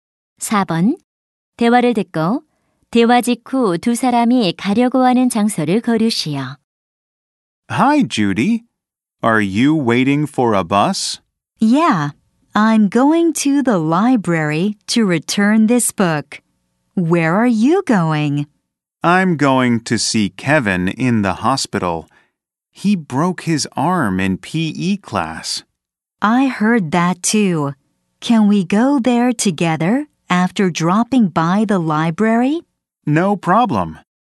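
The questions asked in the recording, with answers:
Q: 대화를 듣고 대화 직후 두 사람이 가려고 하는 장소를 고르시오.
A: 도서관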